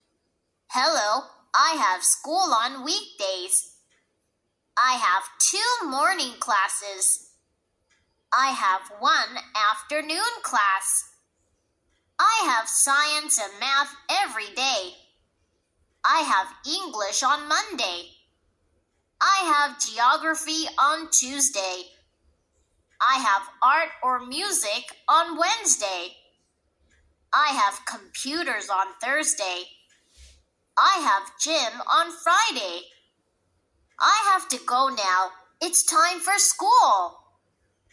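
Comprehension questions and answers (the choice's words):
Listen to the audio carefully!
When does he have English in his school?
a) on Sunday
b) on Monday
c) on Tuesday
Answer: on Monday

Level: 5-9 Tahun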